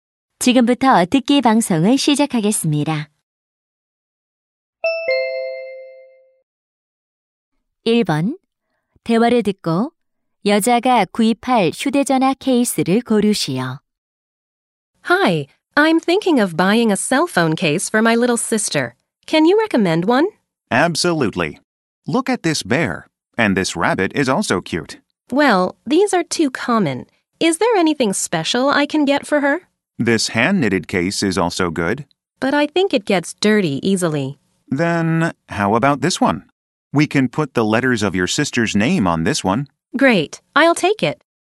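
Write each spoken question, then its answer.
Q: 대화를 듣고 여자가 구입할 휴대전화 케이스를 고르시오.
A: 여동생 이름 글자를 넣을 수 있는 케이스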